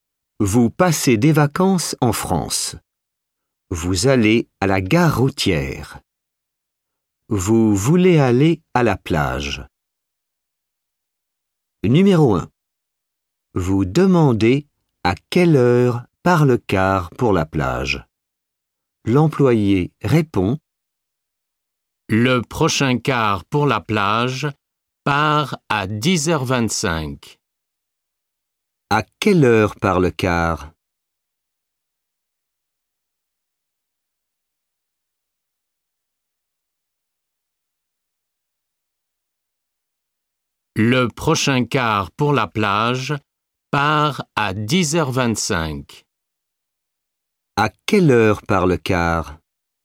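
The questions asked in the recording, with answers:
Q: À quelle heure part le car?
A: À 10h25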